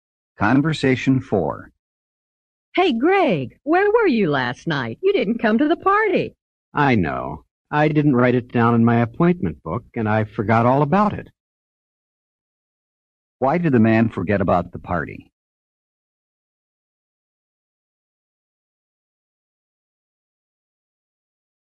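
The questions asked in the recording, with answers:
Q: Why did the man forget about the party?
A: He didn't write it in his appointment book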